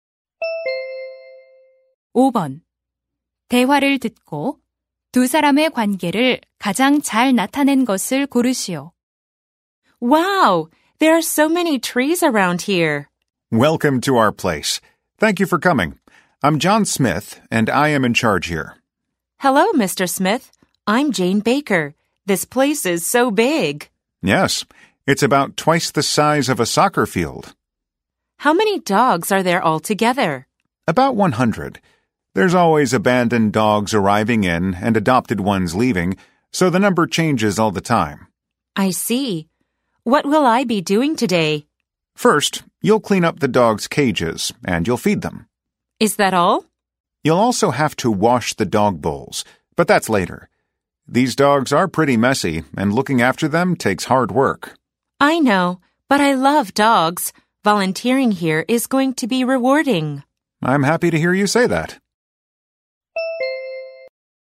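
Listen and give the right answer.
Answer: 유기견 보호소 책임자 - 자원봉사자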